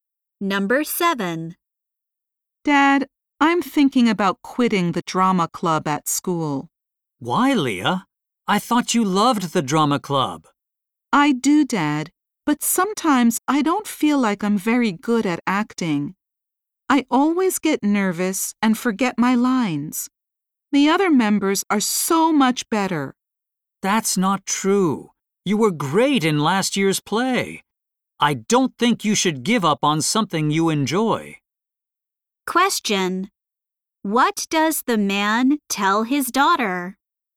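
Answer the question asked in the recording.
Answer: She shouldn't give up on something she enjoys.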